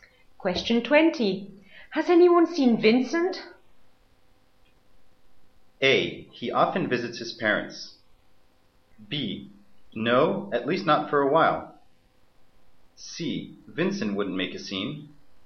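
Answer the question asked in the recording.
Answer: B: No, at least not for a while.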